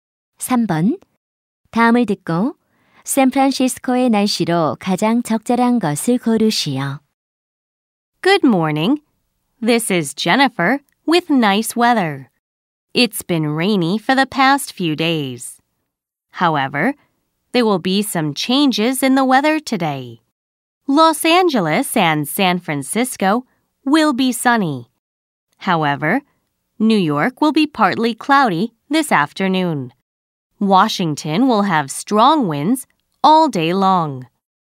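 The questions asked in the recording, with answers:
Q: 다음을 듣고 샌프란시스코의 날씨로 가장 적절한 것을 고르시오.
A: 맑음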